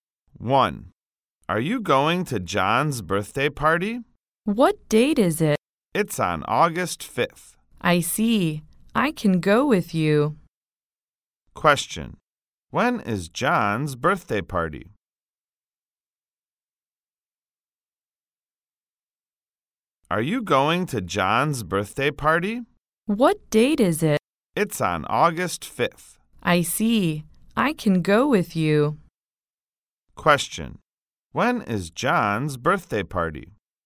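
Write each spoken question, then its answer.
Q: When is John's birthday party?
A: On August 5th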